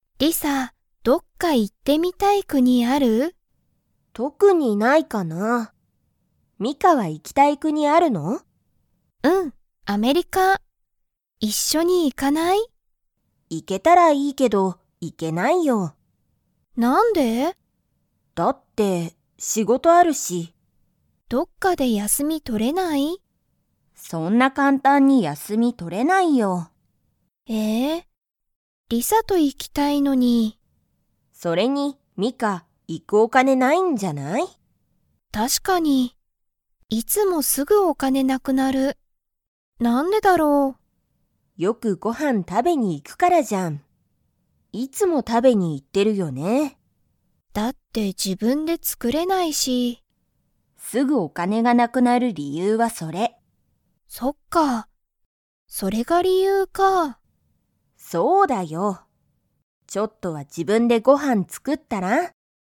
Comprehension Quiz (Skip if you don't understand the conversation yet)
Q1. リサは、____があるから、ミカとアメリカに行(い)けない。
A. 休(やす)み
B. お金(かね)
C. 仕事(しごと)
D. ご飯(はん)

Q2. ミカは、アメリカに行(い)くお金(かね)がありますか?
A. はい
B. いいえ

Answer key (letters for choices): 1C, 2B

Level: Level 2